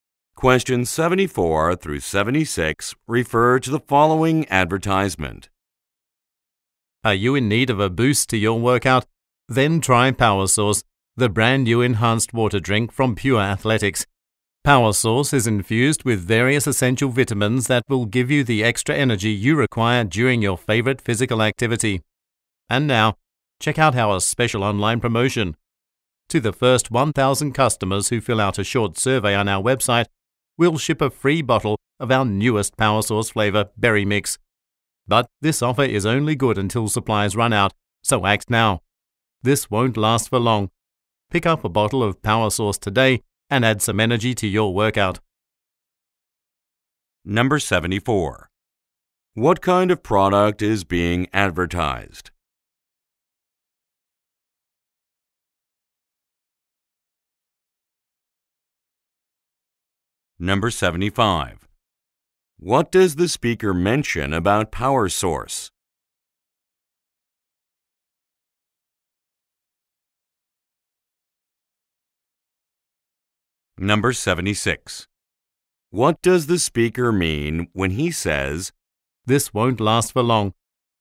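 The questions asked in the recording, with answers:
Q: What kind of product is being advertised?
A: An enhanced water drink

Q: What does the speaker mention about Power Source?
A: It contains essential vitamins

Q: What does the speaker mean when he says,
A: The free offer will end soon, so act quickly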